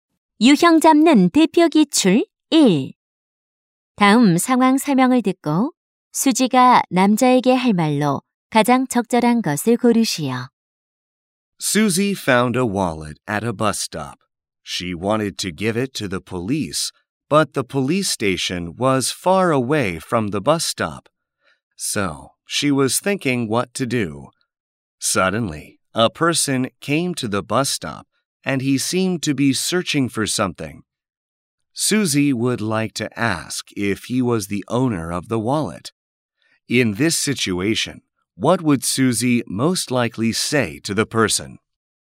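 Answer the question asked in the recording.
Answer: Excuse me, is this your wallet?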